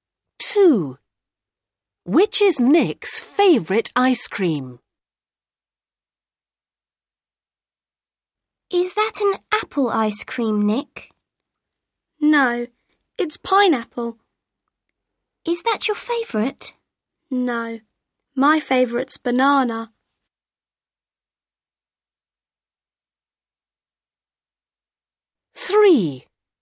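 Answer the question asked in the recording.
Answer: Banana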